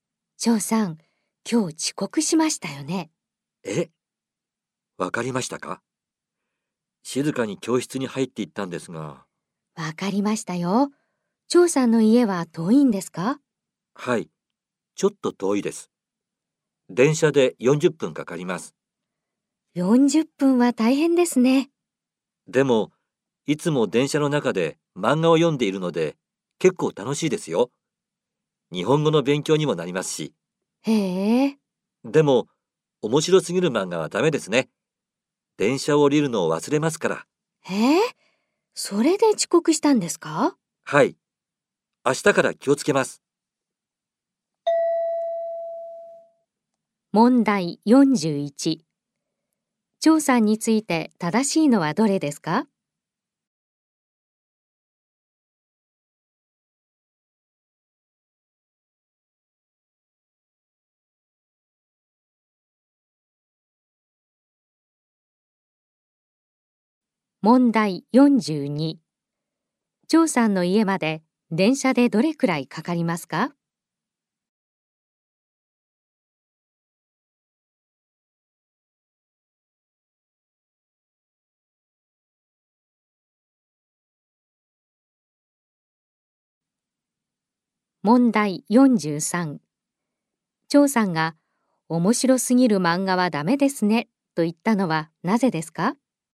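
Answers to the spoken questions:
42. 40分
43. 電車を降りるのを忘れるから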